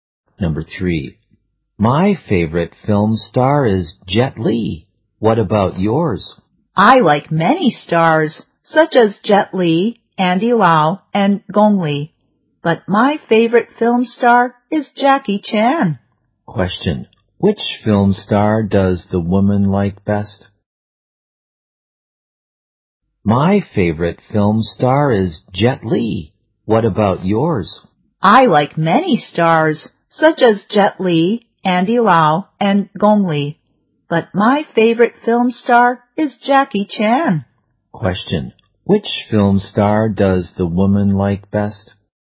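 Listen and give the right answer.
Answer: Jackie Chan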